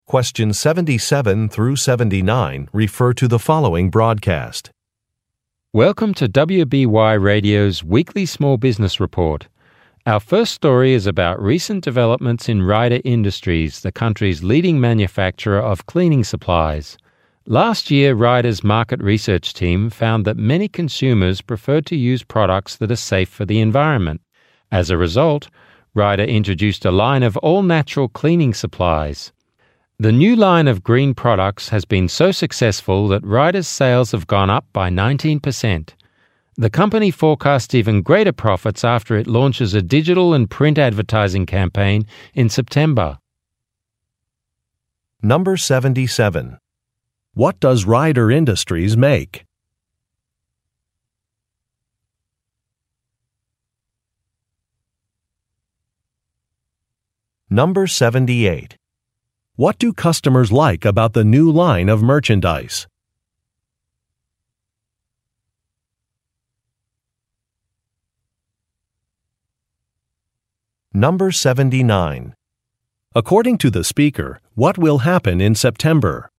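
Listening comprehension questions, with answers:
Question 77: What does Rider Industries make?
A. Kitchen appliances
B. Electric vehicles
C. Gardening supplies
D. Cleaning products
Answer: Cleaning products

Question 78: What do customers like about the new line of merchandise?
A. It is environmentally friendly.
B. It is reasonably priced.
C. It has attractive packaging.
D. It comes in a variety of sizes.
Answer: It is environmentally friendly.

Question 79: According to the speaker, what will happen in September?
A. A live radio interview will be held.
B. An advertising campaign will be launched.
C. An international trade show will take place.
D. A company-wide training program will begin.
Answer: An advertising campaign will be launched.

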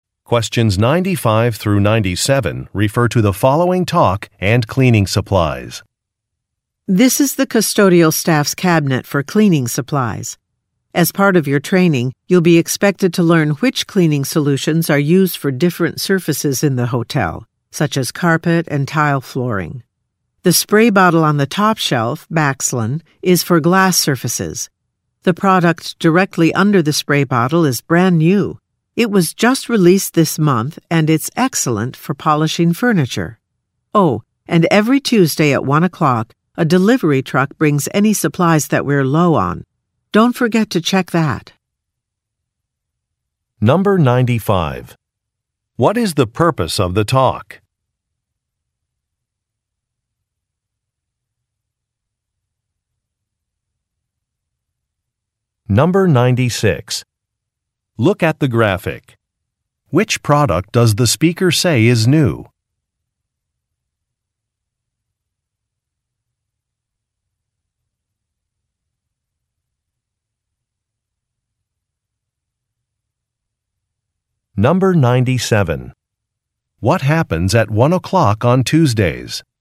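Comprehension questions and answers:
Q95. What is the purpose of the talk?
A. To discuss a schedule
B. To consider changing suppliers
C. To train employees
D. To develop an inventory system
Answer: To train employees

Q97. What happens at one o'clock on Tuesdays?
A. An expense report is due.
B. A work shift begins.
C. A staff meeting is held.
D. A delivery arrives.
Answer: A delivery arrives.

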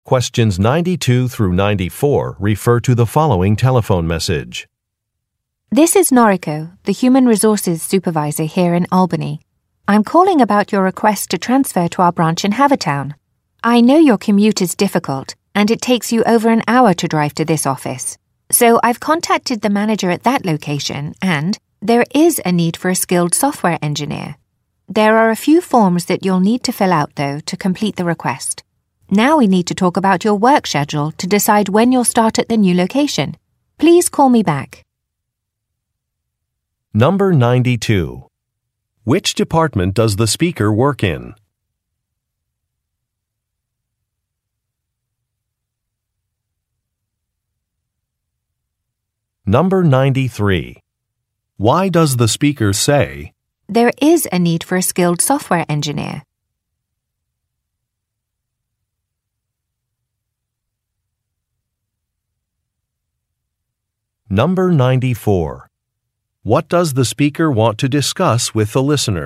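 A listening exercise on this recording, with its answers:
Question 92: Which department does the speaker work in?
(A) Product Development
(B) Human Resources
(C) Legal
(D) Accounting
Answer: Human Resources

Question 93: Why does the speaker say, "there is a need for a skilled software engineer"?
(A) To recommend an employee sign up for more training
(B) To indicate that a project deadline will be extended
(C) To approve a request to transfer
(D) To suggest consulting with an expert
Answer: To approve a request to transfer

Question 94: What does the speaker want to discuss with the listener?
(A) Some sales results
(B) Some client feedback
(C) An office renovation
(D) A work schedule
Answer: A work schedule

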